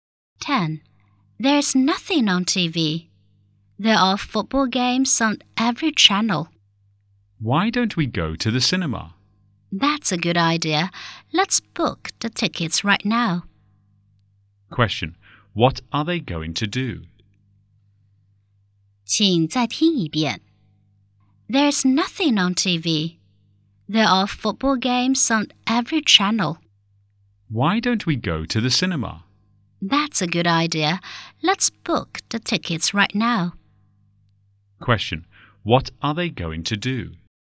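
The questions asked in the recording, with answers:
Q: What are they going to do?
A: Go to the cinema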